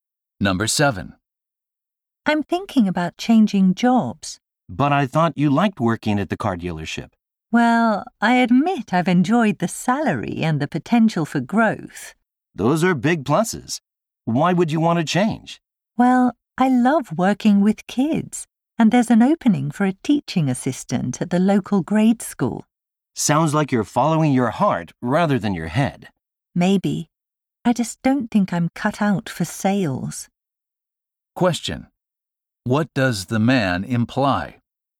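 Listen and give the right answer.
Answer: He is not suited to sales and would rather work with children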